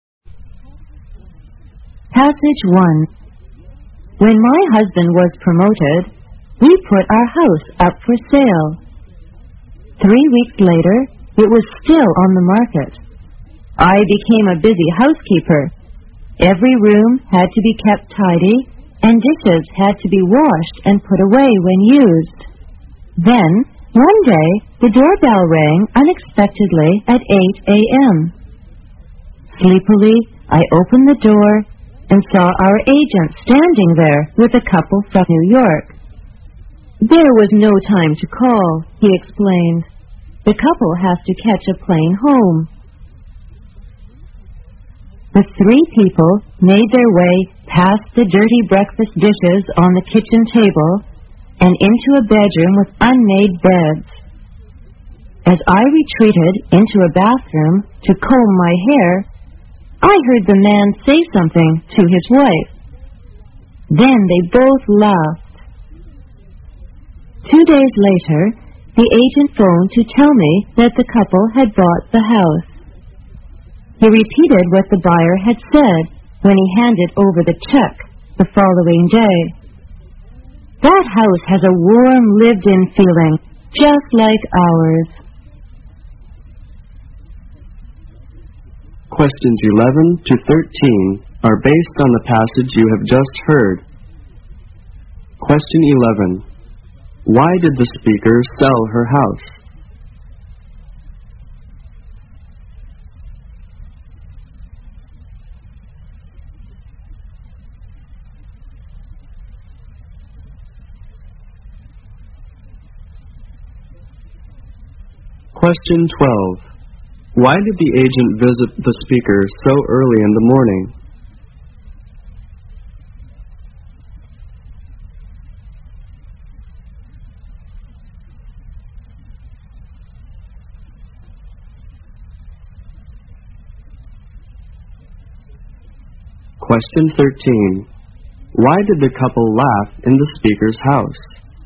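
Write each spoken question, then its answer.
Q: Why did the speaker sell her house?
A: Because her husband was promoted.

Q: Why did the agent visit the speaker so early in the morning?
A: The couple had to catch a plane home, so there was no time to call first.

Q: Why did the couple laugh in the speaker's house?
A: The messy house felt warm and lived-in, just like their own.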